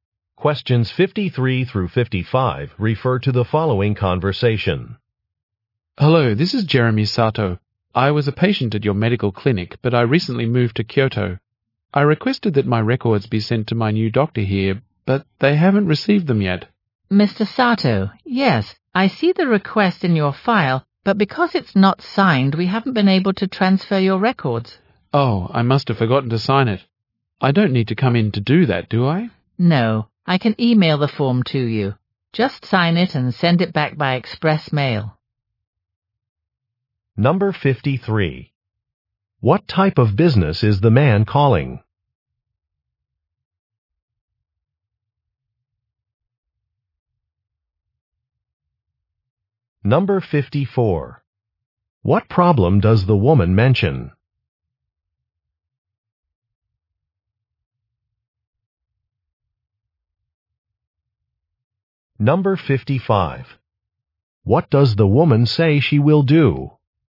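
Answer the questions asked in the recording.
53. A medical clinic
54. The request form was not signed
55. Email him the form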